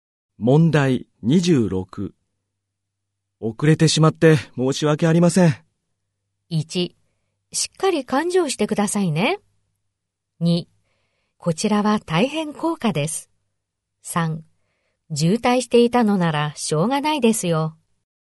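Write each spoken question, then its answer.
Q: 遅れてしまって申し訳ありません。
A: 3: 渋滞していたのならしょうがないですよ。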